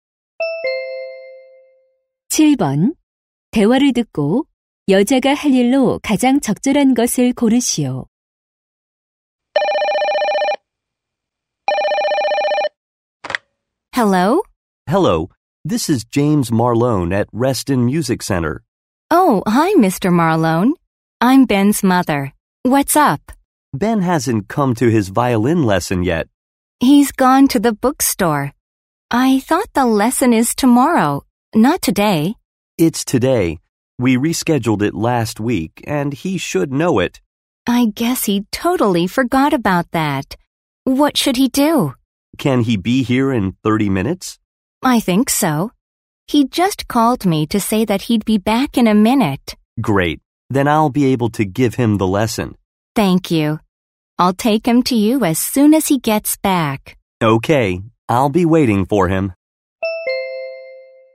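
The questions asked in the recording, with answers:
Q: 대화를 듣고 여자가 할 일로 가장 적절한 것을 고르시오.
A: 아들 Ben을 바이올린 레슨에 데려다주기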